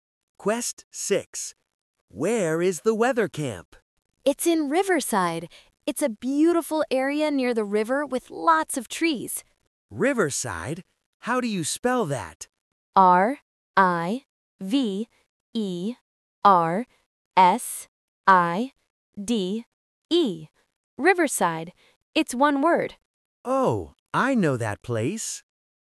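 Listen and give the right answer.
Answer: Riverside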